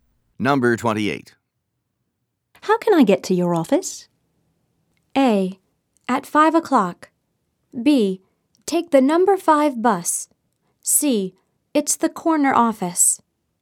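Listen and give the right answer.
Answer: B: Take the number 5 bus.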